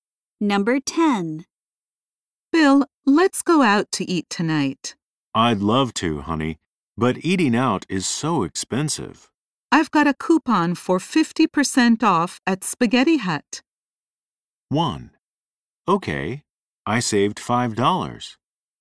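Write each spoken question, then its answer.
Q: I've got a coupon for 50% off at Spaghetti Hut.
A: 3: Okay, let's go there.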